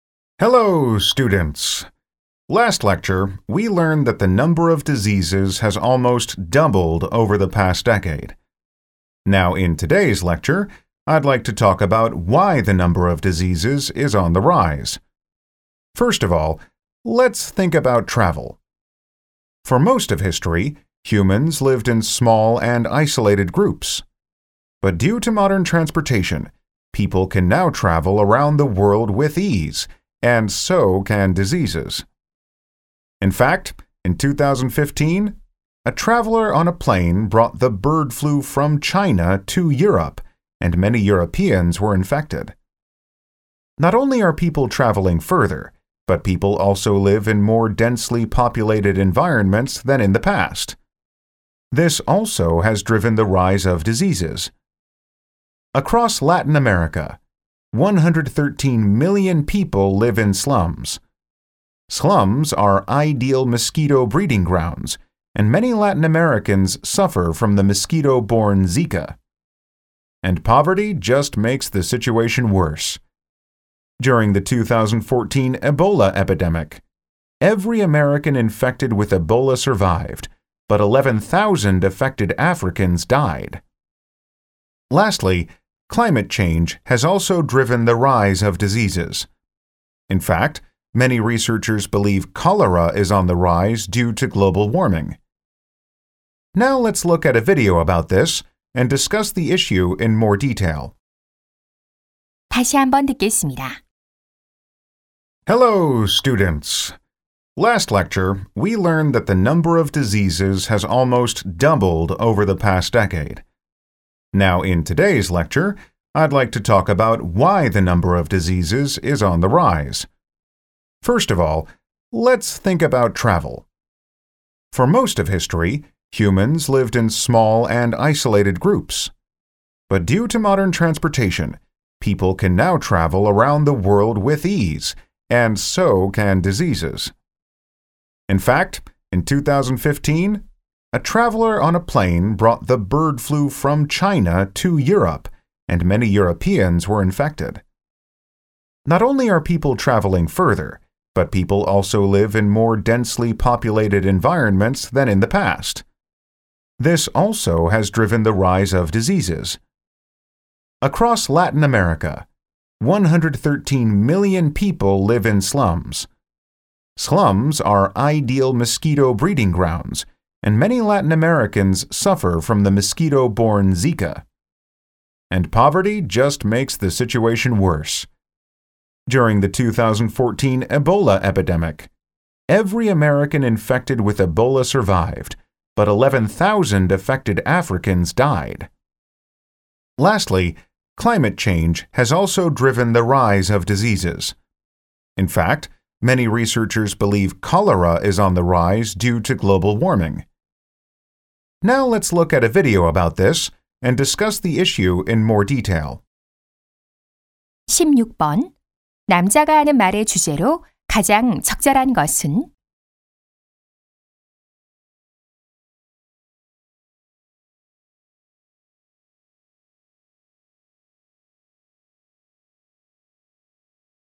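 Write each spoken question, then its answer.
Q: 남자가 하는 말의 주제로 가장 적절한 것은?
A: 질병이 증가하는 원인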